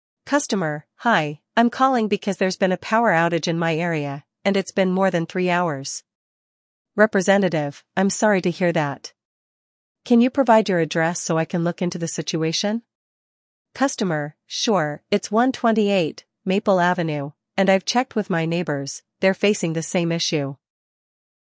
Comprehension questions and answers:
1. What is the customer's issue?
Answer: Power outage

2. How long has the power outage lasted?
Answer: Three hours

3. What is the customer's address?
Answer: 128 Maple Avenue

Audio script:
Customer: Hi, I'm calling because there's been a power outage in my area, and it's been more than three hours.
Representative: I'm sorry to hear that. Can you provide your address so I can look into the situation?
Customer: Sure, it's 128 Maple Avenue, and I've checked with my neighbors—they're facing the same issue.